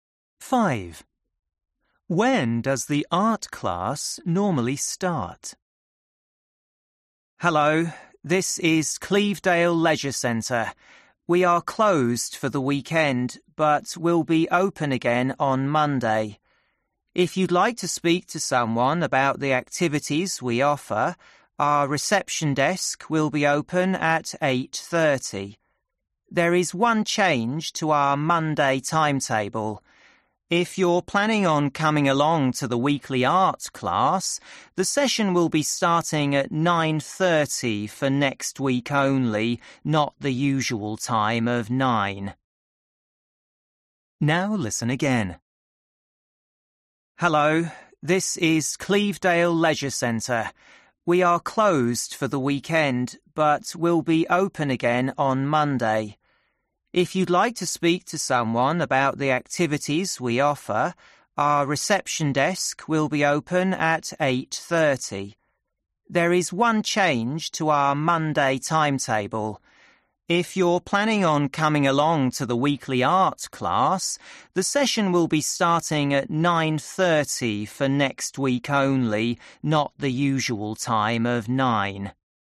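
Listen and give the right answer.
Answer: at 9 o'clock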